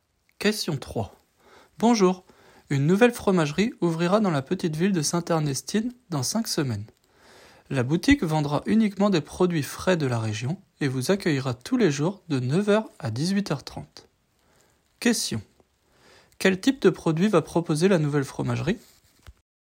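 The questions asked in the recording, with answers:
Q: Quel type de produit va proposer la nouvelle fromagerie?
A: Des produits frais de la région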